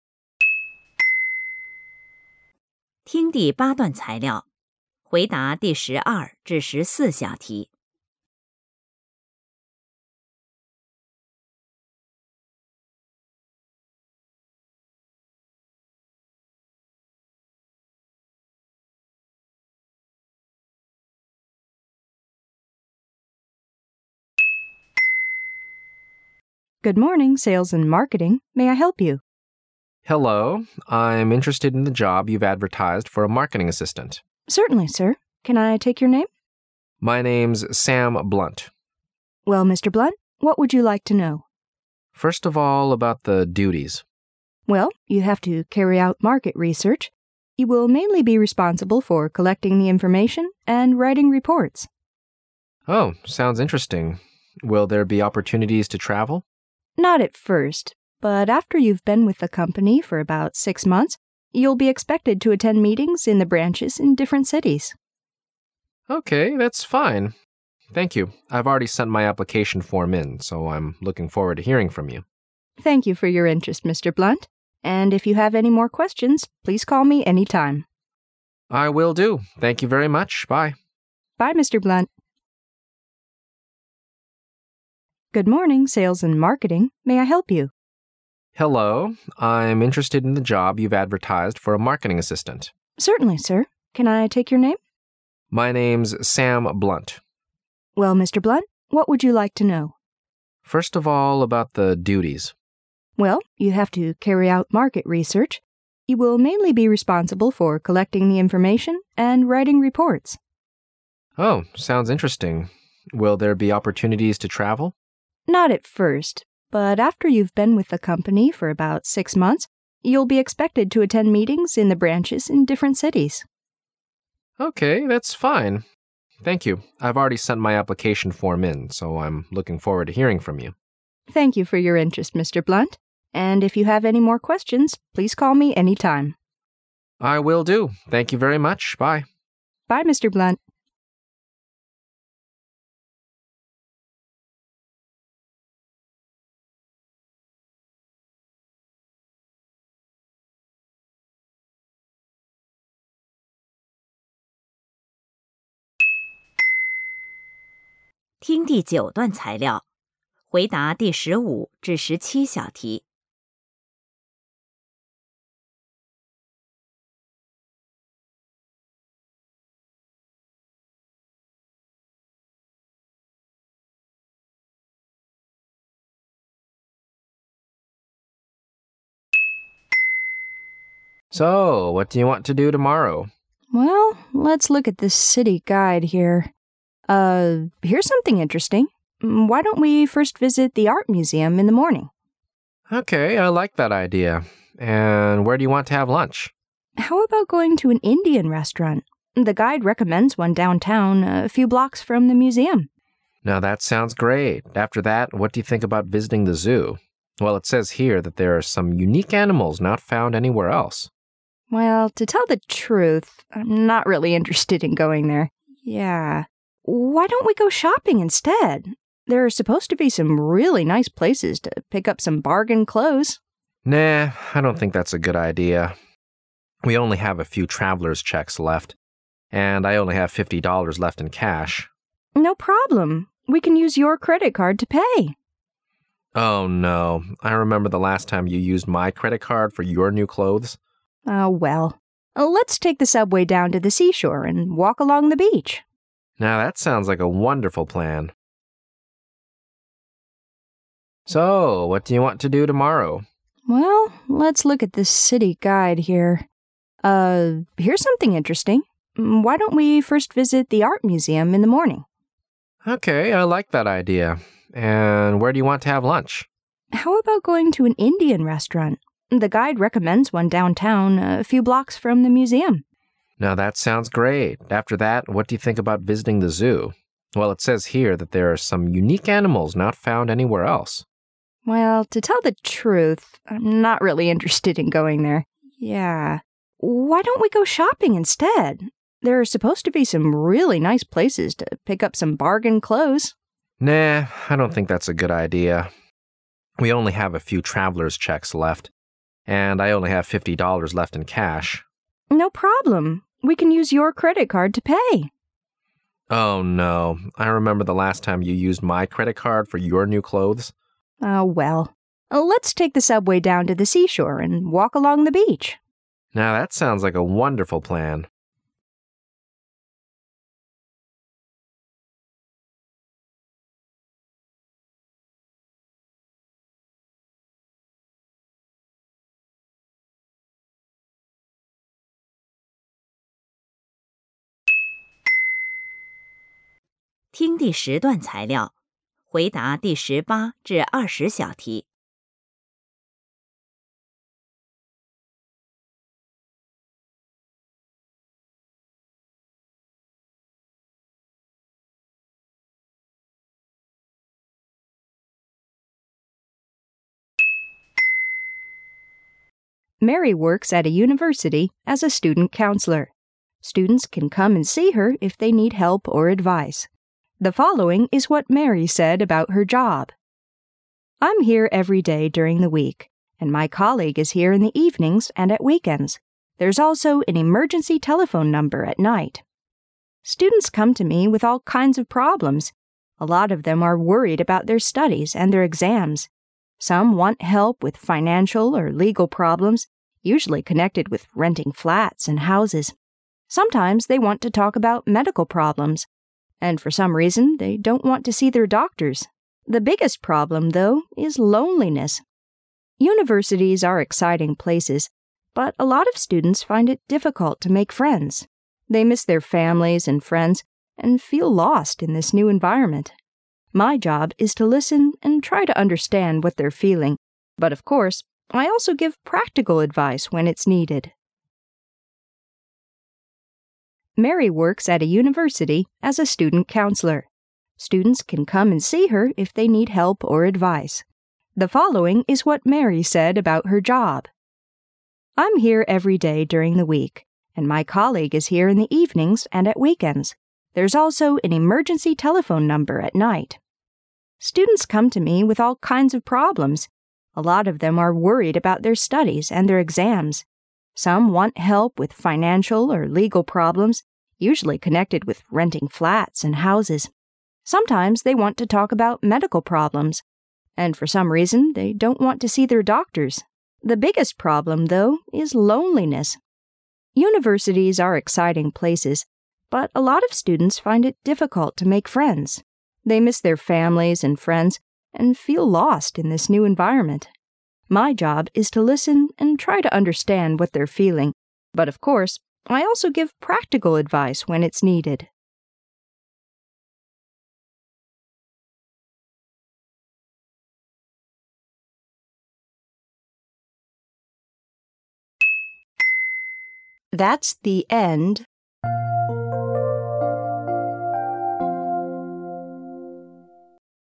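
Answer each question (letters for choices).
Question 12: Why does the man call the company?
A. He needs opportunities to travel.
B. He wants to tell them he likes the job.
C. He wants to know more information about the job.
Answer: C

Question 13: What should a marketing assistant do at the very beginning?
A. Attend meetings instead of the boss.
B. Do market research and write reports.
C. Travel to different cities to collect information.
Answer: B

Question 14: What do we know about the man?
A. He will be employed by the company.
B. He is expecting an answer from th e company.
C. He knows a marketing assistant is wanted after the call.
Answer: B

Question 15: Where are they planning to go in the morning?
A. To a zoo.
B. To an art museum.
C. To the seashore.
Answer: B

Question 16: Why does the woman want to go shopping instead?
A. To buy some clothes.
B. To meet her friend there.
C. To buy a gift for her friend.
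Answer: A

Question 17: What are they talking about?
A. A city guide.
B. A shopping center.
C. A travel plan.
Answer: C

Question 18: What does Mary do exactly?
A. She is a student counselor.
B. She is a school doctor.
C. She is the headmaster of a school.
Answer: A

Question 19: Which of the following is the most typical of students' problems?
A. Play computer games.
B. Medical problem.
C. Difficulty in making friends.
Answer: C

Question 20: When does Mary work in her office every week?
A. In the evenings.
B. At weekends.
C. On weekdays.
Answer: C

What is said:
W: Good morning, Sales and Marketing, may I help you?
M: Hello, I'm interested in the job you've advertised for a marketing assistant.
W: Certainly, sir. Can I take your name?
M: My name's Sam Blunt.
W: Well, Mr. Blunt, what would you like to know?
M: First of all, about the duties.
W: Well, you have to carry out market research. 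You will mainly be responsible for collecting the information and writing reports.
M: Oh, sounds interesting. Will there be opportunities to travel?
W: Not at first, but after you've been with the company for about six months you'll be expected to attend meetings in the branches in different cities.
M:OK, that's fine, thank you. I've already sent my application form in, so I'm looking forward to hearing from you.
W: Thank you for your interest, Mr. Blunt, and if you have any more questions please call me any time.
M:I will do. Thank you very much. Bye.
W: Bye, Mr. Blunt.
听第9段材料,回答第15~17小题。
M: So, what do you want to do tomorrow?
Uh, here's something interesting. Why don't we first visit the Art Museum in the morning?
M: Okay. I like that idea. And where do you want to have lunch?
W: How about going to an Indian restaurant? The guide recommends one downtown a few blocks from the museum.
M: Now that sounds great. 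After that, wh at do you think about visiting the zoo? Well, it says here that there are some unique animals not found anywhere else.
W: Well, to tell the truth, I'm not really interested in going there. Yeah. Why don't we go shopping instead? There are supposed to be some really nice places to pick up some bargain clothes.
M: Nah, I don't think that's a good idea. We only have a few traveler's checks left, and I only have fifty dollars left in cash.
W: No problem. We can use YOUR credit card to pay.
M: Oh, no. I remember the last time you used MY credit card for YOUR new clothes.
W: Oh, well. Let's take the subway down to the seashore and walk along the beach.
M: Now that sounds like a wonderful plan.
听第10段材料,回答第18~20小题。
Mary works at a university as a student counselor. Students can come and see her if they need help or advice. The following is what Mary said about her job.
"I'm here every day during the week, and my colleague is here in the evenings and at weekends. 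There's also an emergency telephone number at night."
"Students come to me with all kinds of problems. A lot of them are worried about their studies and their exams; some want help with financial or legal problems, usually connected with renting flats and houses. Sometimes they want to talk about medical problems and for some reason they don't want to see their doctors. The biggest problem, though, is loneliness. Universities are exciting places, but a lot of students find it difficult to make friends. They miss their families and friends and feel lost in this new environment. My job is to listen and try to understand what they're feeling. But, of course, I also give practical advice when it's needed."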